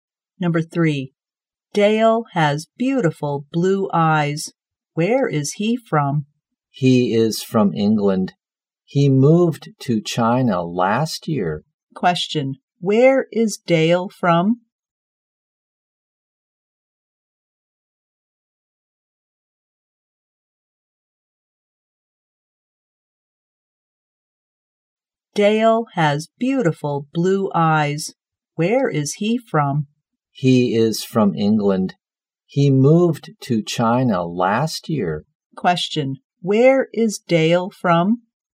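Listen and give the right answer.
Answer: England.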